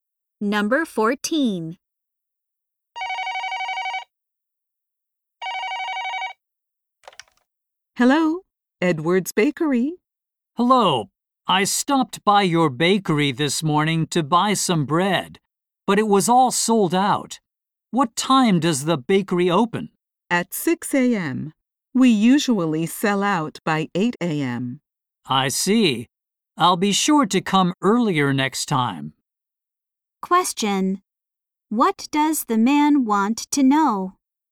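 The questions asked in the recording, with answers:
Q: What does the man want to know?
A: What time the bakery opens.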